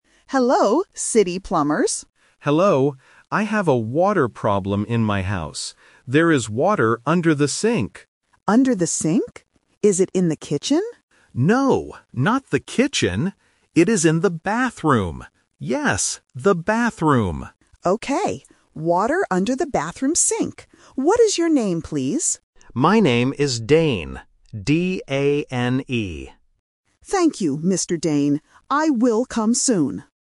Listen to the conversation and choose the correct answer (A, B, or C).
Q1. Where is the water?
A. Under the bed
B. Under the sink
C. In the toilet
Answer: B. Under the sink

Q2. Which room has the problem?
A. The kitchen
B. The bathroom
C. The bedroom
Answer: B. The bathroom

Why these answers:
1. The homeowner clearly states, "There is water under the sink." Option (A) and Option (C) are plausible places for water or furniture in a house, but they are not mentioned in the audio.
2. The homeowner says, "No, not the kitchen. It is in the bathroom. Yes, the bathroom." Option (A) is the trap because the plumber asks "Is it in the kitchen?", but the homeowner says "No". Option (C) is never mentioned.

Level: A1

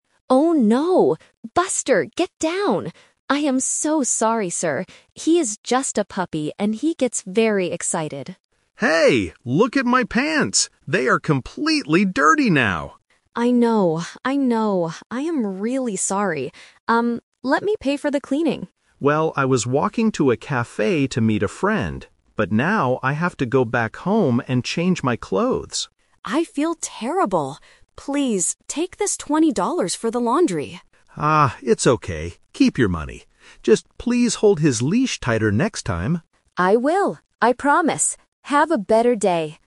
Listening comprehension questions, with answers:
Listen to a conversation in a park. Choose the correct answer (A, B, or C) for each question.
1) What did the dog do?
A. It bit the man's hand.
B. It made the man's pants dirty.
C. It ran away from its owner.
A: B. It made the man's pants dirty.

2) Where does the man have to go now? (The Twist)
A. To a cafe.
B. To a friend's house.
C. Back home.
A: C. Back home.

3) What does the dog owner offer to do?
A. Buy the man some new clothes.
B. Give the man money for cleaning.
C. Take the man to a coffee shop.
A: B. Give the man money for cleaning.

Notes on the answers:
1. The walker clearly complains about the dog's action: "Look at my pants. They are completely dirty now." Trap: Option C is a trap because the dog jumped ("get down"), but it didn't run away. Option A is a plausible problem with dogs, but it is not mentioned in the audio.
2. This is the Twist. The walker changes his plan because of the accident. He says, "...now, I have to go back home and change my clothes." Trap: Option A is what he planned to do at first ("I was walking to a cafe"), but he cannot go there now. Option B is a trap because he wanted to "meet a friend" at the cafe, not at their house.
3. The owner tries to fix the problem by saying, "Please, take this $20 for the laundry" (laundry = cleaning). Trap: Option A is a trap using the word "clothes" mentioned in the audio, but the owner offers to pay for cleaning, not for brand new clothes. Option C is a trap using the word "cafe," which was the walker's destination, not the owner's offer.

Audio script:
Buster, get down! I am so sorry, sir. He is just a puppy and he gets very excited.
Walker: Hey! Look at my pants. They are completely dirty now.
Owner: I know, I know. I am really sorry. Um, let me pay for the cleaning.
Walker: Well, I was walking to a cafe to meet a friend. But now, I have to go back home and change my clothes.
Owner: I feel terrible. Please, take this $20 for the laundry.
Walker: Ah, it's okay. Keep your money. Just please hold his leash tighter next time.

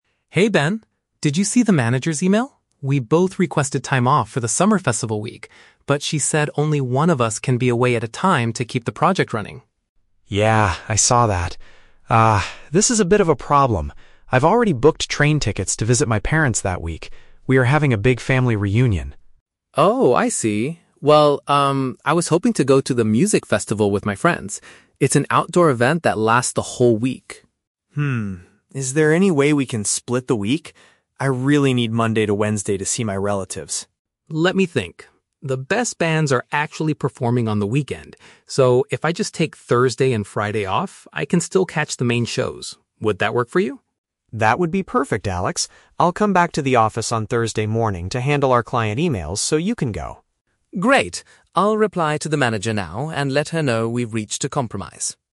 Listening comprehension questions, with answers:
Listen to the conversation between two colleagues and choose the correct answer (A, B, or C).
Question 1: What is the main problem the two colleagues are discussing?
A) They have both been asked to work late during a holiday weekend.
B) They both want the same vacation time but the team needs coverage.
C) They both bought expensive tickets to the same outdoor music event.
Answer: B) They both want the same vacation time but the team needs coverage.

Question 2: Why is Ben hesitant to change his original vacation plan?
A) He has already paid for his transportation to see his family.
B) He has to attend an important client meeting early in the week.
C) He is responsible for sending a project update to the manager.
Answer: A) He has already paid for his transportation to see his family.

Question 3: How do they finally resolve their scheduling conflict?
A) Ben decides to cancel his family trip to help finish the project.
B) Alex agrees to take a shorter leave at the end of the workweek.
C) They agree to ask the manager to hire someone to handle emails.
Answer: B) Alex agrees to take a shorter leave at the end of the workweek.

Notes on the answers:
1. Alex states that they both "requested time off" for the same week, but the manager said "only one of us can be away at a time to keep the project running."
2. Ben explains that he has already "booked train tickets" (paid for transportation) to "visit my parents" (see his family).
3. Alex decides to just "take Thursday and Friday off" so he can see the bands. Thursday and Friday are the end of the workweek.

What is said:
Alex: Hey Ben. Did you see the manager's email? We both requested time off for the Summer Festival week, but she said only one of us can be away at a time to keep the project running.
Ben: Yeah, I saw that. Ah, this is a bit of a problem. I've already booked train tickets to visit my parents that week. We are having a big family reunion.
Alex: Oh, I see. Well, um, I was hoping to go to the music festival with my friends. It's an outdoor event that lasts the whole week.
Is there any way we can split the week? I really need Monday to Wednesday to see my relatives.
Alex: Let me think. The best bands are actually performing on the weekend. So, if I just take Thursday and Friday off, I can still catch the main shows. Would that work for you?
Ben: That would be perfect, Alex! I'll come back to the office on Thursday morning to handle our client emails so you can go.

